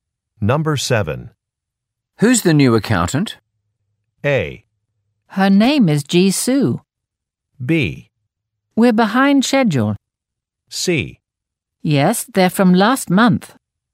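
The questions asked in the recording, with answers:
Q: Who's the new accountant?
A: A: Her name is Jisoo.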